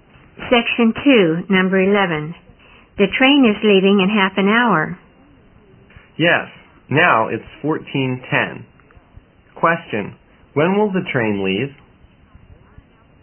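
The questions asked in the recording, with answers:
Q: when will the train leave?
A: At 14:40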